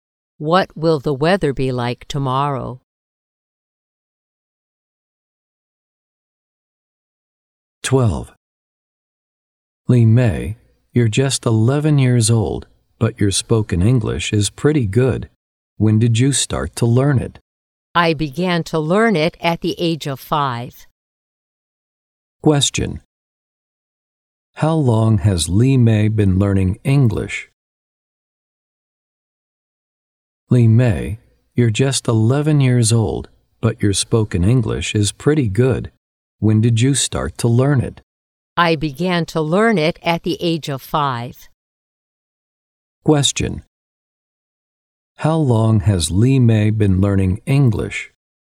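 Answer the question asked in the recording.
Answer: For 6 years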